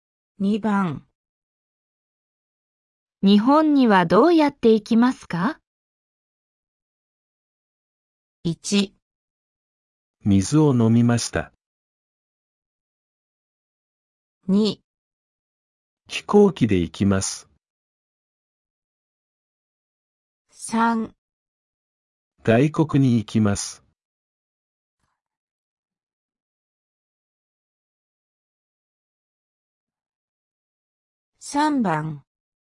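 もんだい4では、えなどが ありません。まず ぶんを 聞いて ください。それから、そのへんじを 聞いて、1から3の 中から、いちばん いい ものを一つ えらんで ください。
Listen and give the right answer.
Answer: 2

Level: N4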